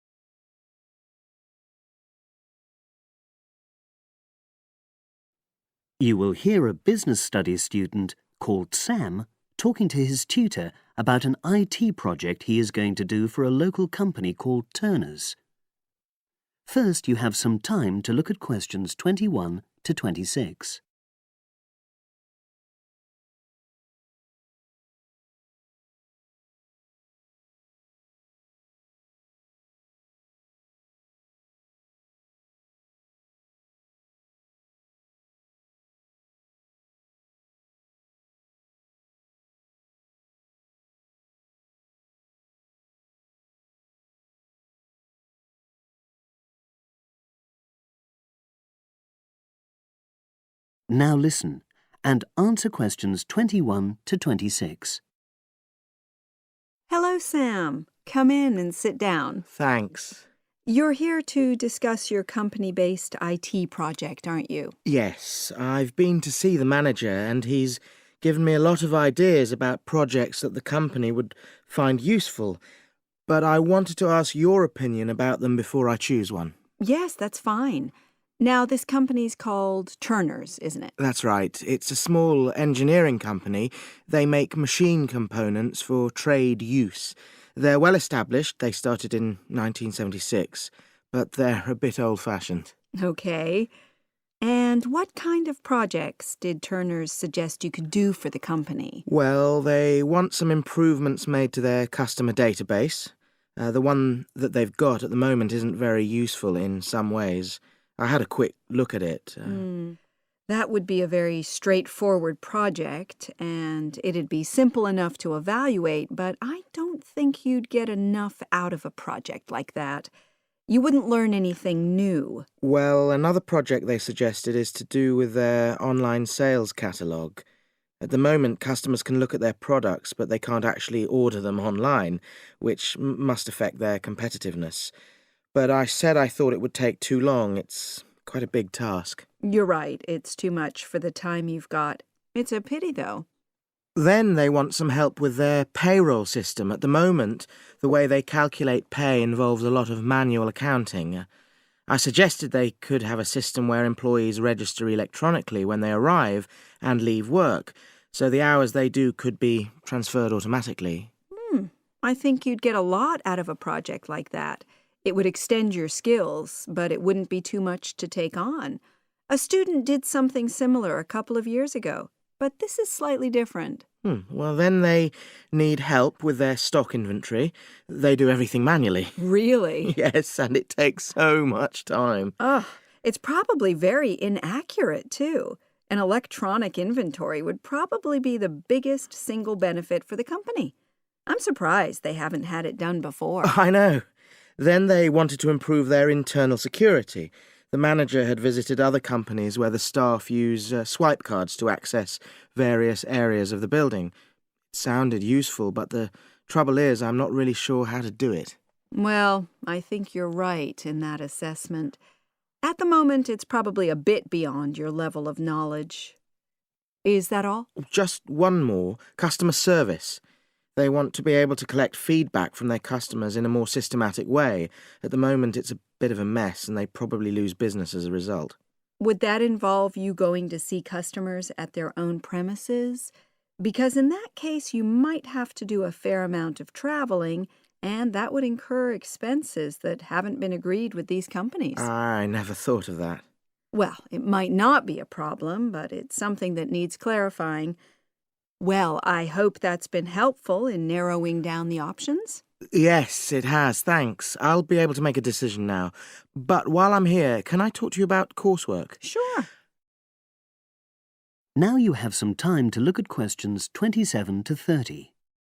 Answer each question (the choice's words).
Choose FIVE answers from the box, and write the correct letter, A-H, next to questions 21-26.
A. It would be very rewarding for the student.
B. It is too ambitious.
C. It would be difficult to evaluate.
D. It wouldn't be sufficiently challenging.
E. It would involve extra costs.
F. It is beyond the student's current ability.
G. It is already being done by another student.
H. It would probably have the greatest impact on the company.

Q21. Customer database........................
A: It wouldn't be sufficiently challenging.

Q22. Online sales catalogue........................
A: It is too ambitious.

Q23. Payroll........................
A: It would be very rewarding for the student.

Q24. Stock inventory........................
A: It would probably have the greatest impact on the company.

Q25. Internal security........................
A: It is beyond the student's current ability.

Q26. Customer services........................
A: It would involve extra costs.